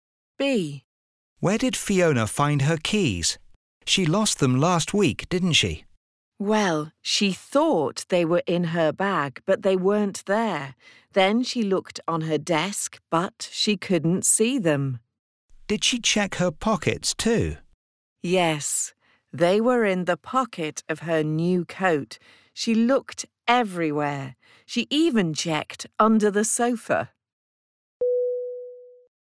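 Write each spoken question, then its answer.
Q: Where did Fiona find her keys?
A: In the pocket of her new coat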